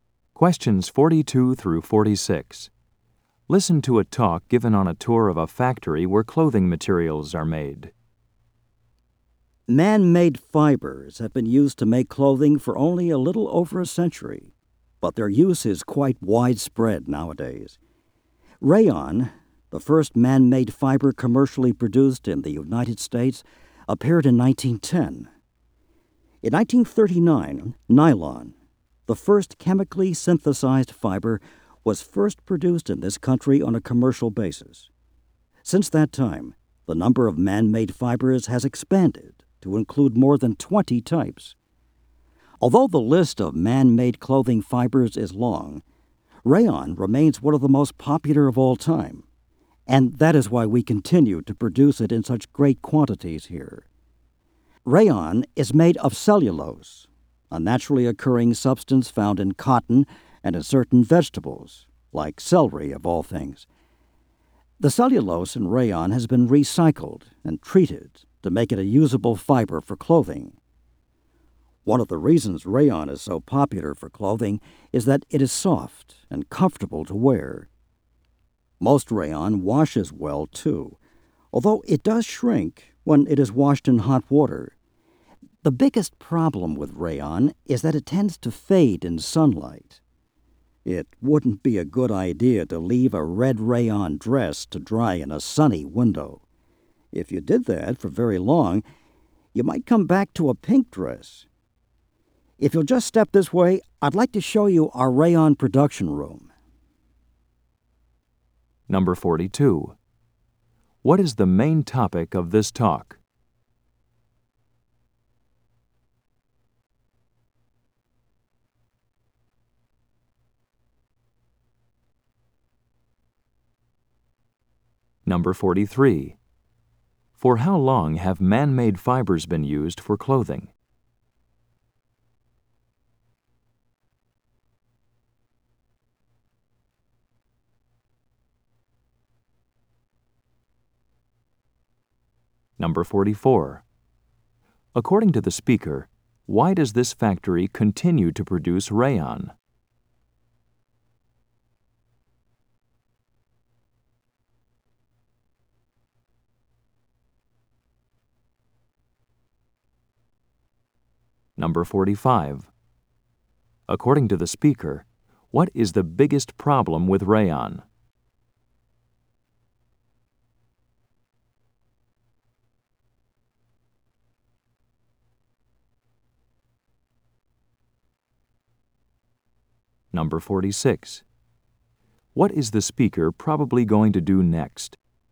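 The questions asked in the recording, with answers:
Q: What is the main topic of this talk?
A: Rayon, a man-made fiber

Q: For how long have man-made fibers been used for clothing?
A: A little over a century

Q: According to the speaker, why does this factory continue to produce rayon?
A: It remains one of the most popular fibers

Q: What is the biggest problem with rayon?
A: It fades in sunlight

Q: What is the speaker probably going to do next?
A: Show the rayon production room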